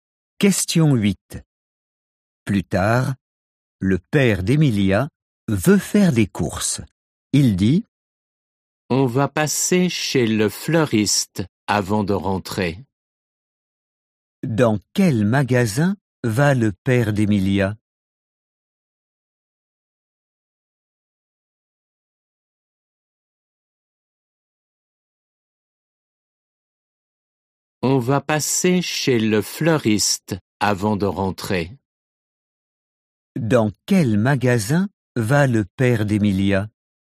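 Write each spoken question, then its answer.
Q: Dans quel magasin va le père d'Emilia?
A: Chez le fleuriste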